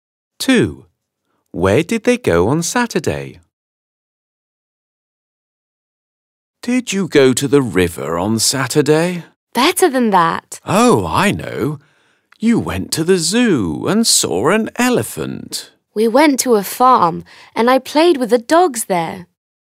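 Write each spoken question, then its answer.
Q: Where did they go on Saturday?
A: to a farm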